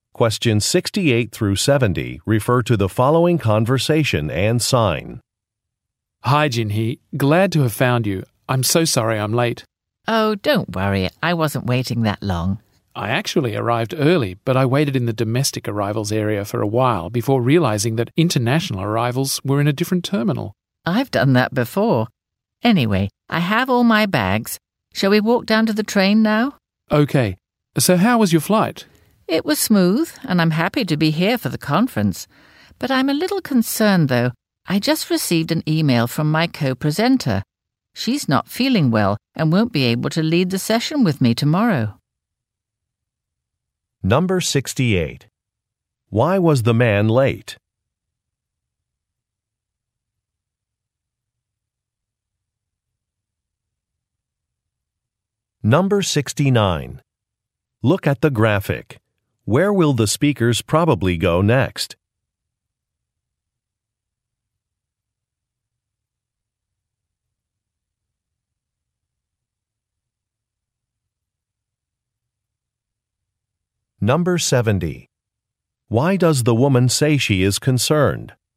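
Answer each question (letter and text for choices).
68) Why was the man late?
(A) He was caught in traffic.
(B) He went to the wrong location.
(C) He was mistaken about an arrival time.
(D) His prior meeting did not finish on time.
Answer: (B) He went to the wrong location.

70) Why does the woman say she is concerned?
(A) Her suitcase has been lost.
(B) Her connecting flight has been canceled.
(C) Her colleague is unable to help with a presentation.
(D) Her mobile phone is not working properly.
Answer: (C) Her colleague is unable to help with a presentation.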